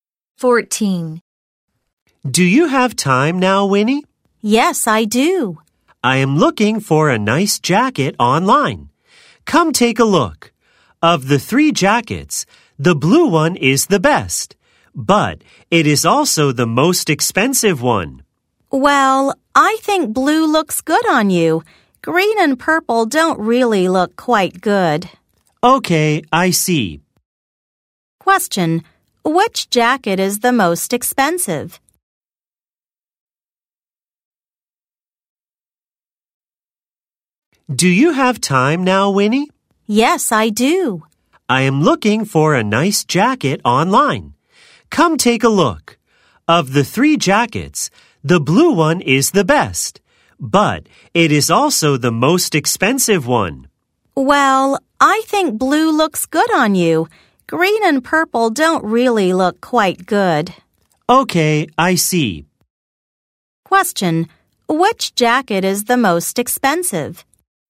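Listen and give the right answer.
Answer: The blue one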